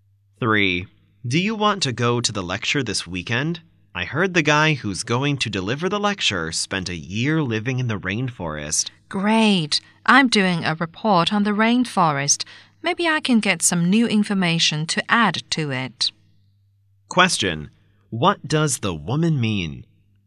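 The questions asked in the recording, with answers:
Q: What does the woman mean?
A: She wants to go because the lecture may give her new information for her rainforest report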